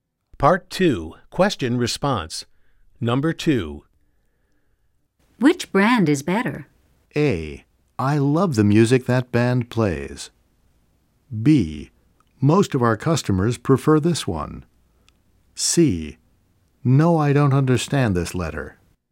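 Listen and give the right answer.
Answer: B: Most of our customers prefer this one.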